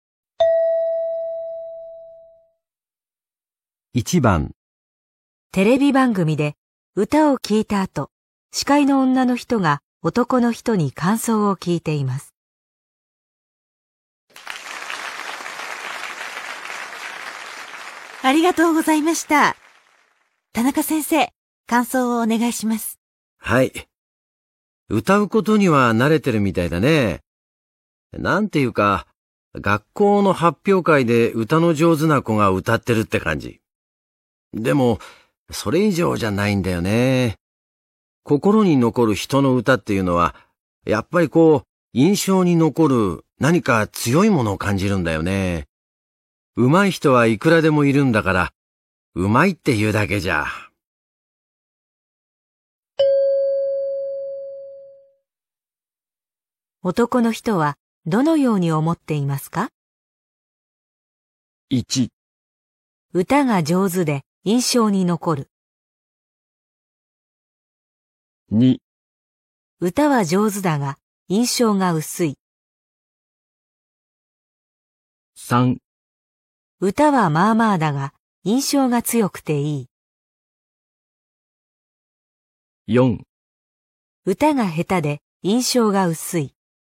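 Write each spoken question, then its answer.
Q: 男の人はどのように思っていますか?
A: 2: 歌は上手だが印象が薄い。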